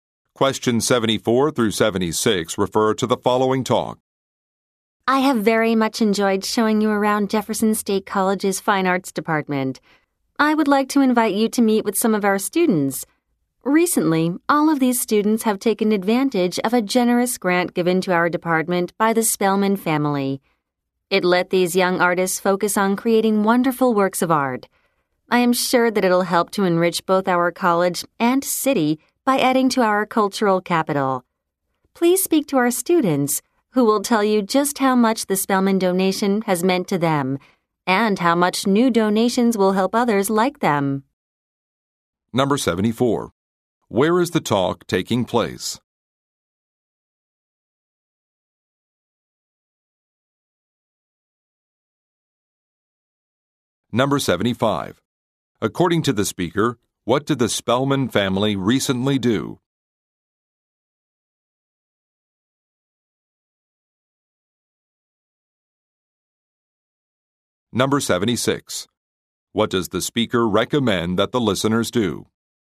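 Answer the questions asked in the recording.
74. At Jefferson State College's Fine Arts Department
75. Gave a grant to the department
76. Speak to the students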